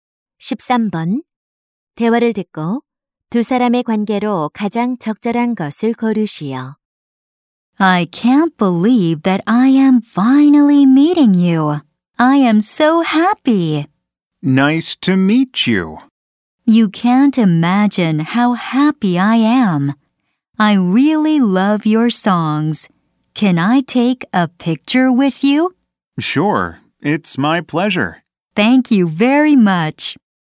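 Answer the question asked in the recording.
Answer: 팬과 가수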